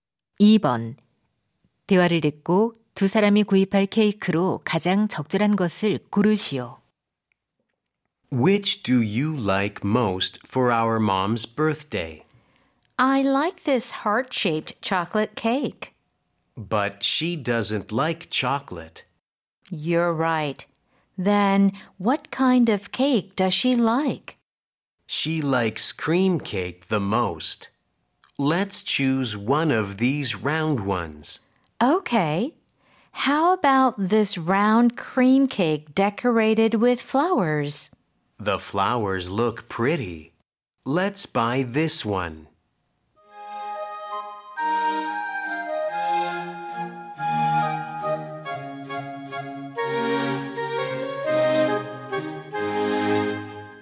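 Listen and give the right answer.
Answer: 꽃으로 장식된 둥근 크림 케이크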